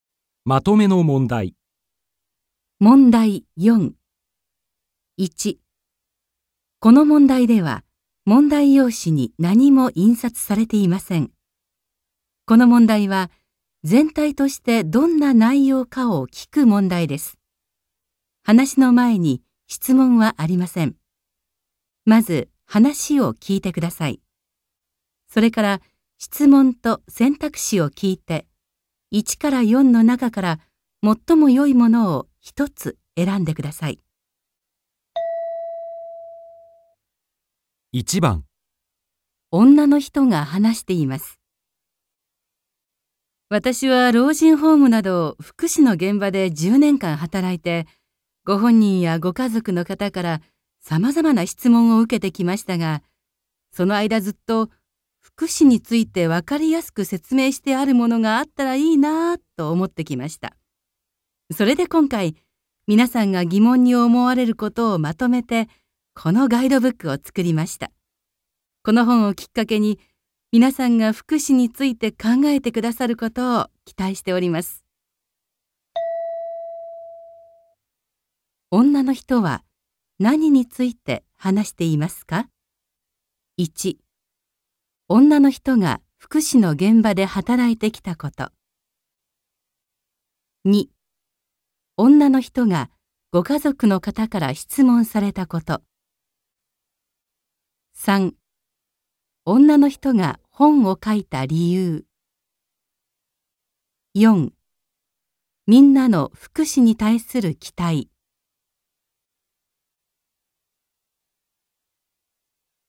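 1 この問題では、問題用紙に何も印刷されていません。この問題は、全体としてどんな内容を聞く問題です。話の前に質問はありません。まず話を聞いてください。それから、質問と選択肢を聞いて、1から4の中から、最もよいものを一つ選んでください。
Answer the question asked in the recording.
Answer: 女の人が本を書いた理由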